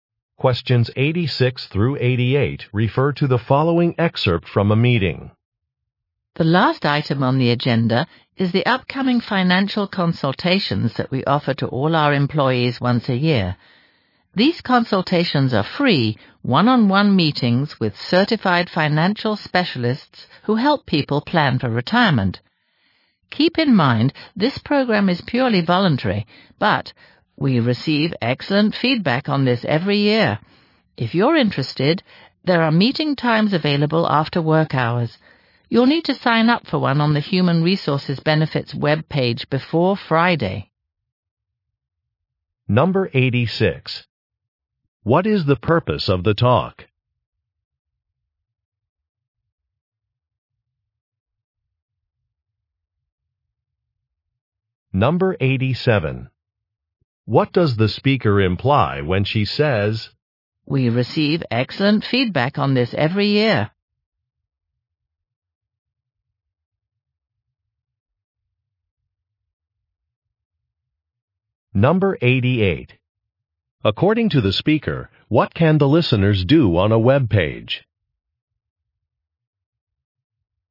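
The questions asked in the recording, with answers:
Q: What is the purpose of the talk?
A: To announce annual financial consultations

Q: According to the speaker, what can the listeners do on a web page?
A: Sign up for a consultation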